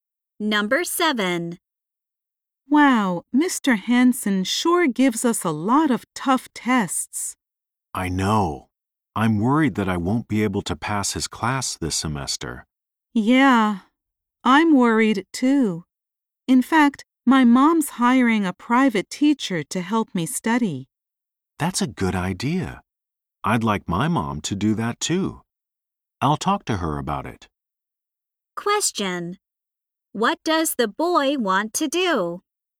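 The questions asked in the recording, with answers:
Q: What does the boy want to do?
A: Get a private teacher to help him study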